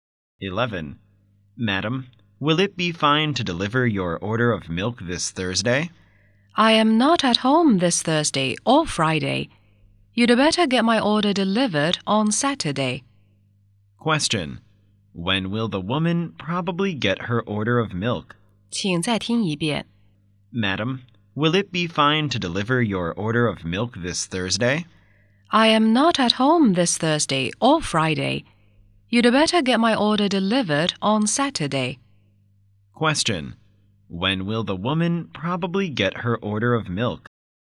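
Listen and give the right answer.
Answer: On Saturday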